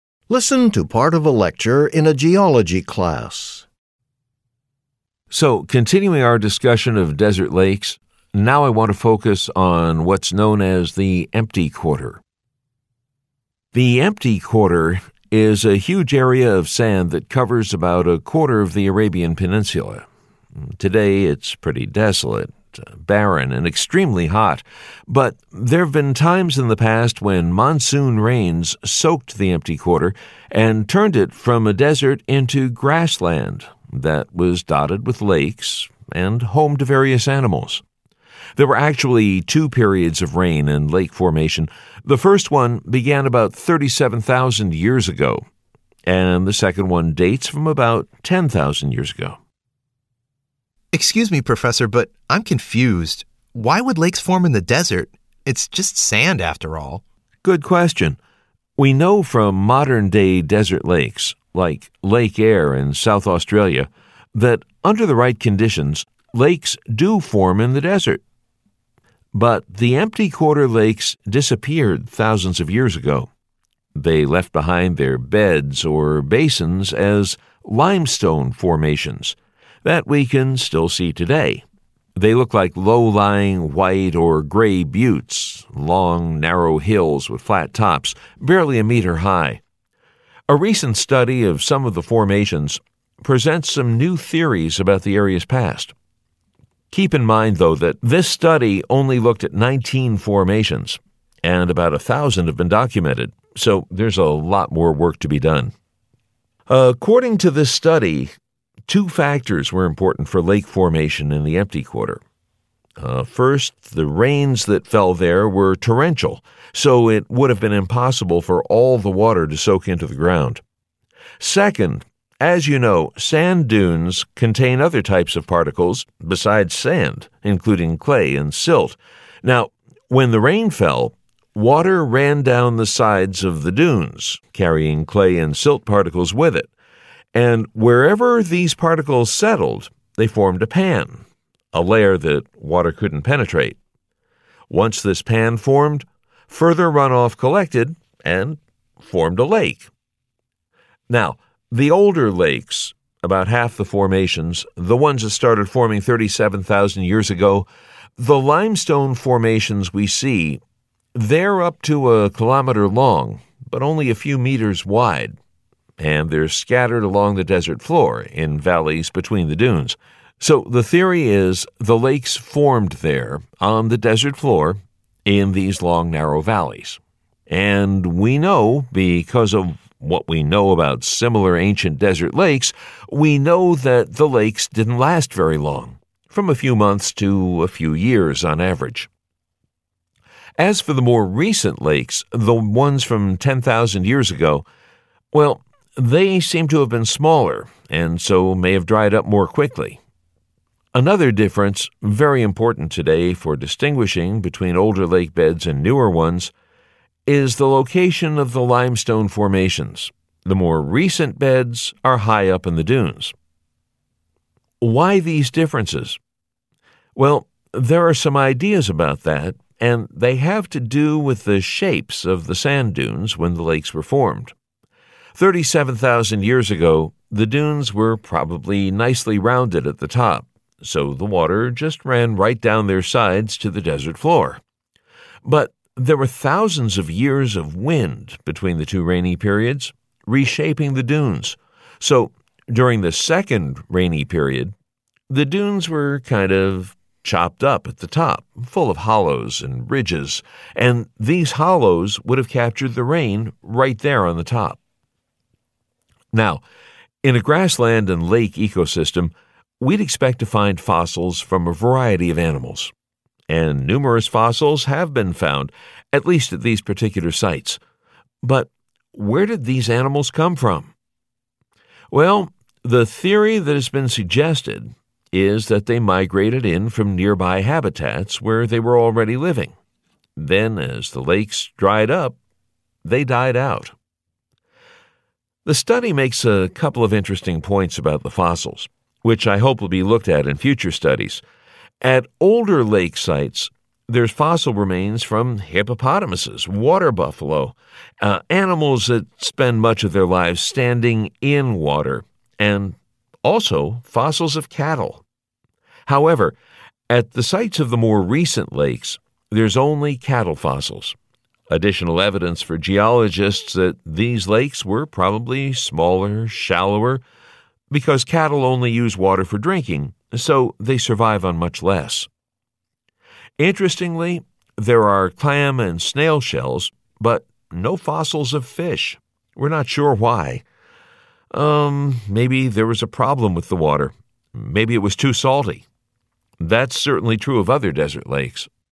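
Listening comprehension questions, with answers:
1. What is the professor's opinion about the conclusions of the recent study of the limestone formations in the Empty Quarter?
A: They are tentative because the study looked at only 19 of about 1,000 formations, so more work is needed.

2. According to the professor, what feature of the sand dunes made the formation of the lakes possible?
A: The dunes contained clay and silt, which formed a pan that water couldn't penetrate.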